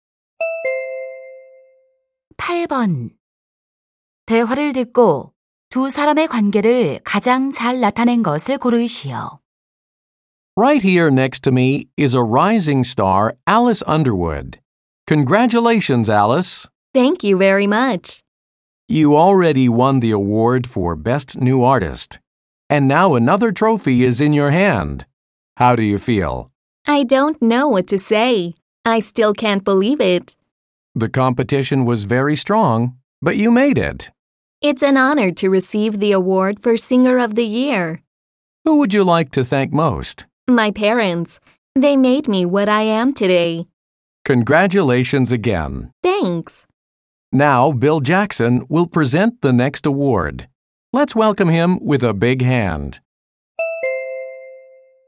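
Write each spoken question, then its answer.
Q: 대화를 듣고 두 사람의 관계를 가장 잘 나타낸 것을 고르시오.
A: 시상식 진행자와 가수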